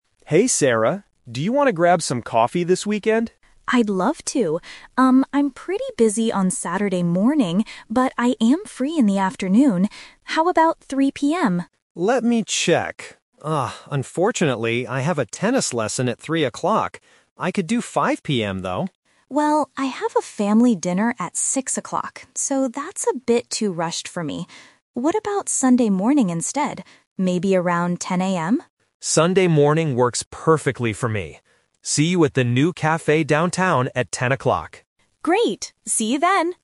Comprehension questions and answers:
Listen to the conversation and choose the correct answer (A, B, or C).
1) When do they finally agree to meet for coffee?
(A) Saturday at 3:00 PM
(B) Saturday at 5:00 PM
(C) Sunday at 10:00 AM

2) Why can't John meet at 3:00 PM on Saturday?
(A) He has to work.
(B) He has a sports class.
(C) He has to eat with his family.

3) What will Sarah do on Saturday evening?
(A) She will go to a new cafe.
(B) She will have dinner with her family.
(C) She will play tennis.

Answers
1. (C) Sunday at 10:00 AM
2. (B) He has a sports class.
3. (B) She will have dinner with her family.

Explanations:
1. They agree on Sunday at 10:00 AM at the end of the conversation. Option (A) is a trap because Sarah suggests 3:00 PM first, but John is busy. Option (B) is a trap because John suggests 5:00 PM, but Sarah rejects it.
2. John says he has a "tennis lesson" at 3:00 PM, which is a sports class. Option (A) is not mentioned in the audio. Option (C) is a trap because having a family dinner is Sarah's plan, not John's.
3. Sarah says, "I have a family dinner at 6:00" on Saturday. Option (A) is a trap because the new cafe is for Sunday morning. Option (C) is a trap because playing tennis is John's activity.

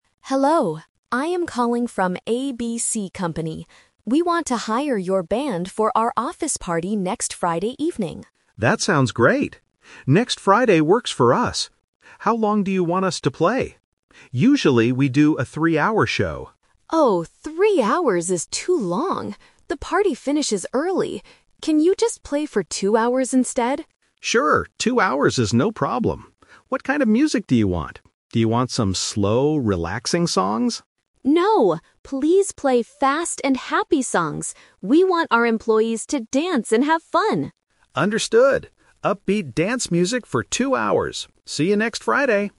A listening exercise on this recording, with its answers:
Listen to the conversation on the phone. Choose the correct answer (A, B, or C) for each question.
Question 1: How long will the band play at the company party?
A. One hour.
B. Two hours.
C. Three hours.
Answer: B. Two hours.

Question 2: Why does the woman want a shorter performance?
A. Because the party finishes early.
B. Because the band is too expensive.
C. Because the employees are too tired.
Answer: A. Because the party finishes early.

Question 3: What kind of music does the woman request?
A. Slow, relaxing songs.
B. Classical music.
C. Fast and happy songs.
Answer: C. Fast and happy songs.

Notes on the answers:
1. The woman specifically asks, "Can you just play for two hours instead?" and the man agrees. Option (C) is the A2 Twist/Trap; the man says "Usually, we do a three-hour show," but the woman rejects this idea because it's too long. Option (A) is not mentioned in the audio.
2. The woman gives the reason clearly: "Oh, three hours is too long. The party finishes early." Options (B) and (C) are plausible reasons for shortening a party or performance, but they are never mentioned in the conversation.
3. The woman says, "No, please play fast and happy songs. We want our employees to dance..." Option (A) is a trap because the man suggests it ("Do you want some slow, relaxing songs?"), but the woman says "No." Option (B) is a distractor and is not mentioned.

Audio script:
Woman: Hello, I am calling from ABC Company. We want to hire your band for our office party next Friday evening.
Man: That sounds great! Next Friday works for us. How long do you want us to play? Usually, we do a three-hour show.
Woman: Oh, three hours is too long. The party finishes early. Can you just play for two hours instead?
Man: Sure, two hours is no problem. What kind of music do you want? Do you want some slow, relaxing songs?
Woman: No, please play fast and happy songs. We want our employees to dance and have fun!

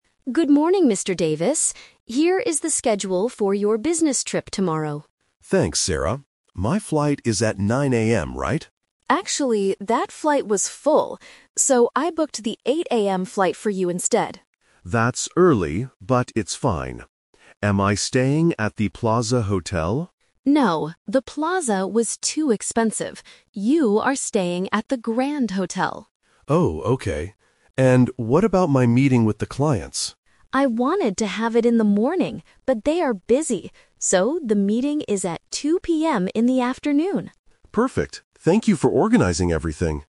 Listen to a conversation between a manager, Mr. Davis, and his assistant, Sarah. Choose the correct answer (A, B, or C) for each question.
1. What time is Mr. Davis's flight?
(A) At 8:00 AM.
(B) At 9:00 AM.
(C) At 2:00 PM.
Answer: (A) At 8:00 AM.

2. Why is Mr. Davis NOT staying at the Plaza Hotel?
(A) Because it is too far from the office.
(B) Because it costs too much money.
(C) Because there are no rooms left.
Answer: (B) Because it costs too much money.

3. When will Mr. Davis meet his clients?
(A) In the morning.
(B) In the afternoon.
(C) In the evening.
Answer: (B) In the afternoon.

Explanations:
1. Sarah says she booked the "8:00 AM flight" because the other one was full. Option (B) is a trap; 9:00 AM was his original plan, but that flight was full. Option (C) is a trap using the time of the meeting.
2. Sarah says they are not using the Plaza because it was "too expensive." Option (B) paraphrases this correctly. Option (A) is not mentioned. Option (C) is a trap; the flight was full, but she didn't say the hotel was full.
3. Sarah explicitly states the meeting is "at 2:00 PM in the afternoon." Option (A) is a trap; she wanted to have it in the morning, but the clients were busy. Option (C) is not mentioned in the audio.

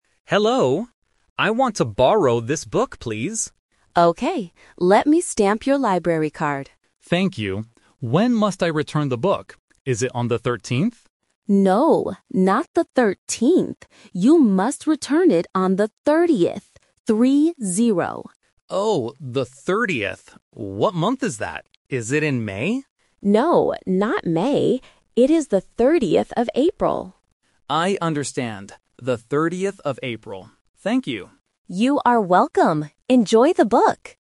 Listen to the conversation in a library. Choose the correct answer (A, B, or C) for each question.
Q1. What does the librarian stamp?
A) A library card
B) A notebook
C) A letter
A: A) A library card

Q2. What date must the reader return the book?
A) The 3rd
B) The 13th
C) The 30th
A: C) The 30th

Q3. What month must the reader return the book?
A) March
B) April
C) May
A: B) April

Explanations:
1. The librarian clearly says, "Let me stamp your library card". Option B (notebook) and Option C (letter) are just plausible paper-related items but are never mentioned.
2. The reader asks if he needs to return it on "the 13th" (Option B is the phonetic trap). The librarian corrects him: "No, not the 13th. You must return it on the 30th," and confirms with "Three-zero." Option A (The 3rd) is a single-digit trap.
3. The reader asks, "Is it in May?" (Option C is the trap). The librarian says, "No, not May. It is the 30th of April". Option A (March) is not mentioned.

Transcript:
Reader: Hello. I want to borrow this book, please.
Librarian: Okay. Let me stamp your library card.
Reader: Thank you. When must I return the book? Is it on the 13th?
Librarian: No, not the 13th. You must return it on the 30th. Three-zero.
Reader: Oh, the 30th. What month is that? Is it in May?
Librarian: No, not May. It is the 30th of April.
Reader: I understand. The 30th of April. Thank you.

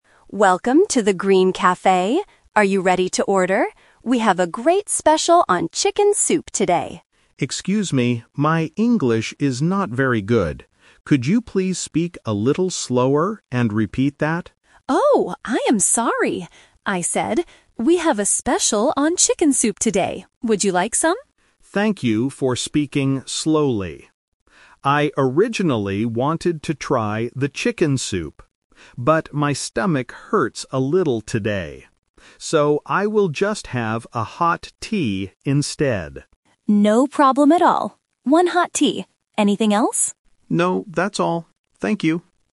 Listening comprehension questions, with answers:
Listen to the conversation and circle the correct answer (A, B, or C).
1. What does the customer ask the server to do at the beginning?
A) To bring her a new menu.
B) To speak more slowly.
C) To translate the food names.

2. What did the server suggest to the customer?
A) Chicken soup.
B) Hot tea.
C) A cold drink.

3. What does the customer finally order?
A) Chicken soup.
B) Hot tea.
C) A glass of water.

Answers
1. B) To speak more slowly.
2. A) Chicken soup.
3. B) Hot tea.

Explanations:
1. The customer explicitly asks, "Could you please speak a little slower and repeat that?" because her English is not very good. Why the trap is wrong: Options (A) and (C) are plausible things a language learner might ask for in a restaurant, but they were not mentioned in the audio.
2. The server tells the customer, "...we have a special on chicken soup today." This is his suggestion. Why the trap is wrong: Option (B) is the trap. Hot tea is what the customer eventually orders, but it is not what the server suggested. Option (C) was not mentioned.
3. The customer makes her final decision clear: "So, I will just have a hot tea instead." Why the trap is wrong: Option (A) is the trap (The Twist). The customer says, "I originally wanted to try the chicken soup," but she changes her mind because her stomach hurts. Option (C) was not mentioned.

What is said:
Server: Welcome to The Green Cafe! Are you ready to order? We have a great special on chicken soup today.
Customer: Excuse me, my English is not very good. Could you please speak a little slower and repeat that?
Server: Oh, I am sorry! Would you like some?
Customer: Thank you for speaking slowly. I originally wanted to try the chicken soup. But my stomach hurts a little today. So, I will just have a hot tea instead.
Server: No problem at all. One hot tea. Anything else?
Customer: No, that's all. Thank you.

